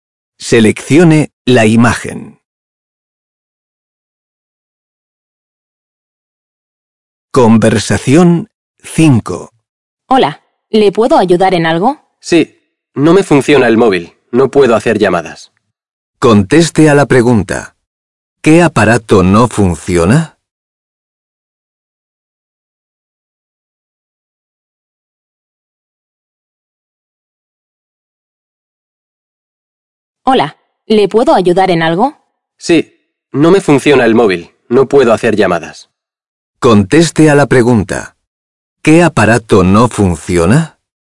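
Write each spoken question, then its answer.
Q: ¿Qué aparato no funciona?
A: El móvil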